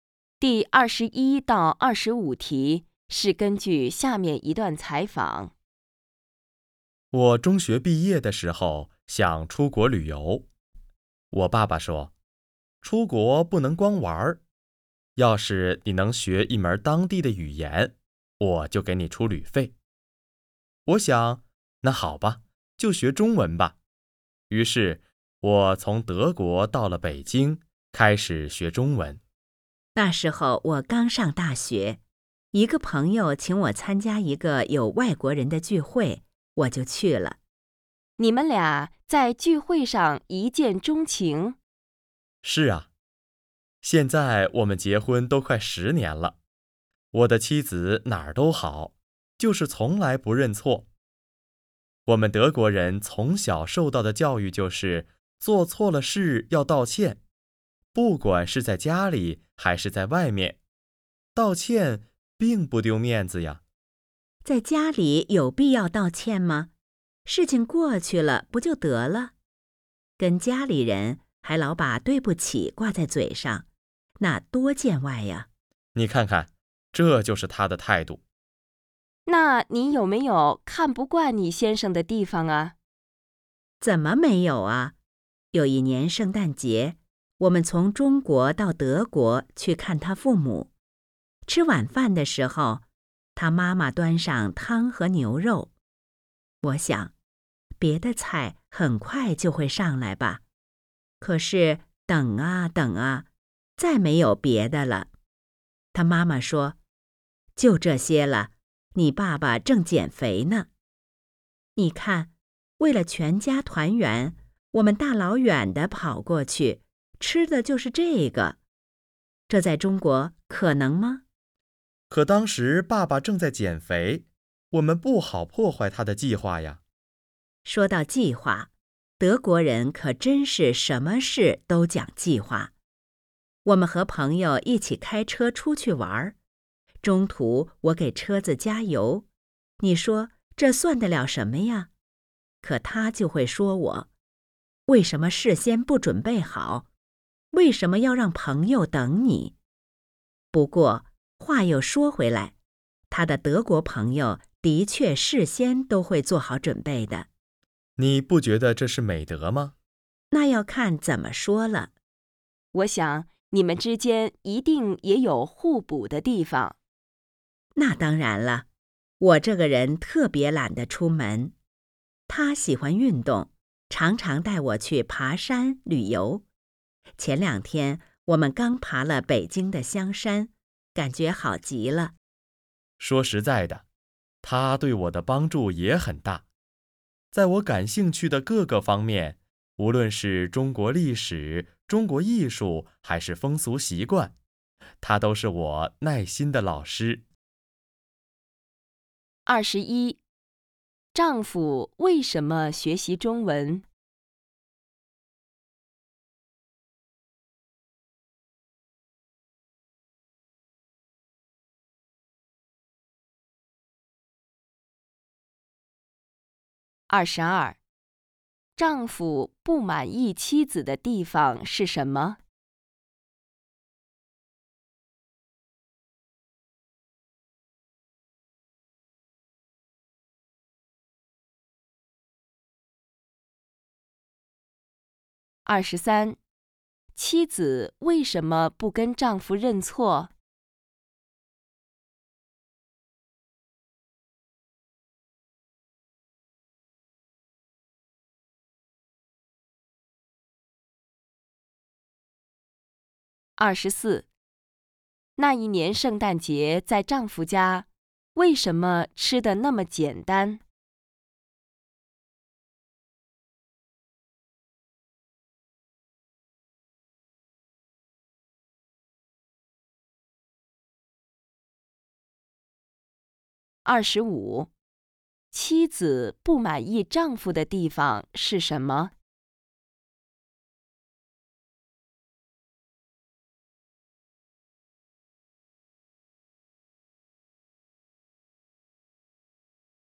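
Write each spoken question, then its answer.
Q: 丈夫为什么学习中文?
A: 爸爸说学会当地语言就给他出出国旅费

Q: 丈夫不满意妻子的地方是什么?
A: 从来不认错

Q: 妻子为什么不跟丈夫认错?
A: 觉得跟家里人道歉太见外

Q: 那一年圣诞节在丈夫家,为什么吃得那么简单?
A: 爸爸正在减肥

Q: 妻子不满意丈夫的地方是什么?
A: 什么事都讲计划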